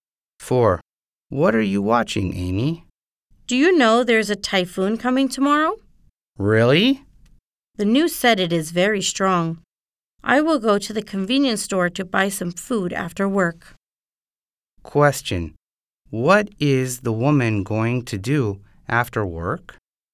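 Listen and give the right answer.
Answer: Go to the convenience store to buy some food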